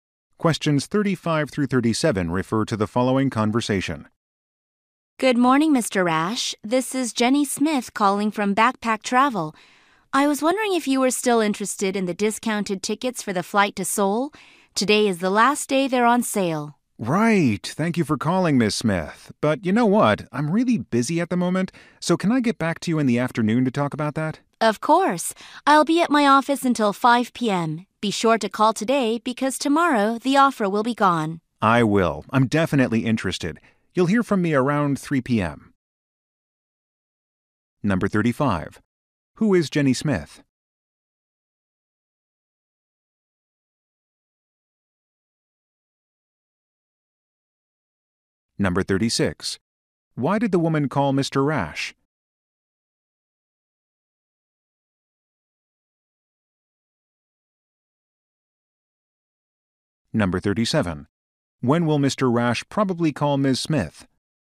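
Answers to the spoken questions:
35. A travel agent at Backpack Travel
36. To ask if he is still interested in discounted tickets to Seoul
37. Around 3 p.m.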